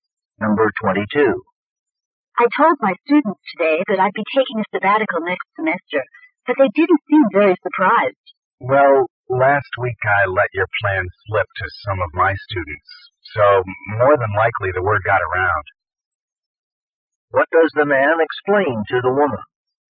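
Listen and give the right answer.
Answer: He told some students about her sabbatical, and the news spread.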